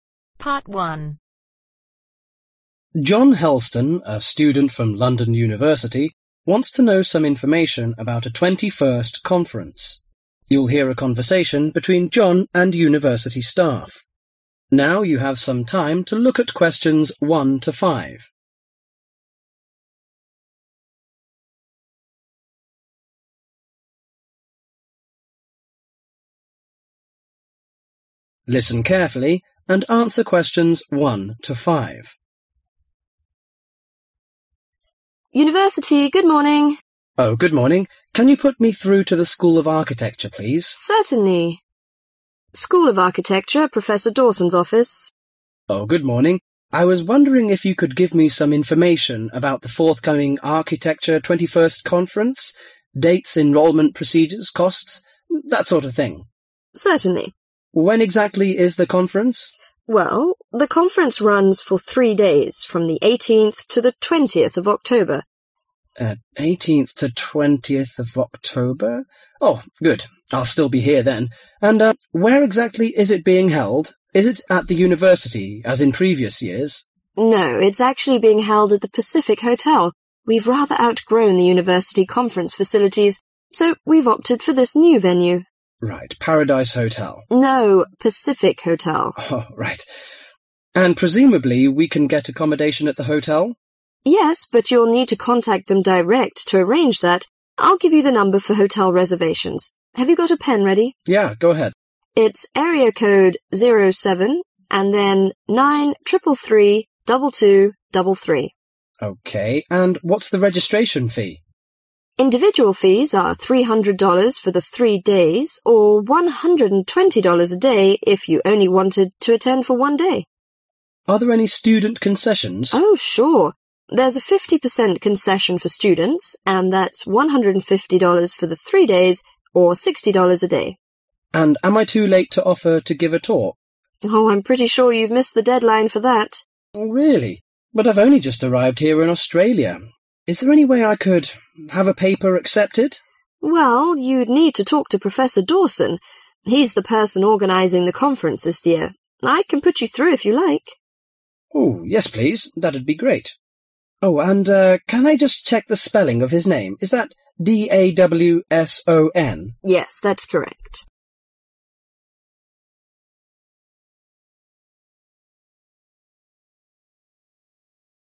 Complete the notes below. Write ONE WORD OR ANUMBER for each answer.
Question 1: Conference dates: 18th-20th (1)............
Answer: October

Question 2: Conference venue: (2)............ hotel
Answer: Pacific

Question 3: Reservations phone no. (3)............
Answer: 0793332233

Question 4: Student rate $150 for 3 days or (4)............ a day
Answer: $60

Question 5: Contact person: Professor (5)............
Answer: Dawson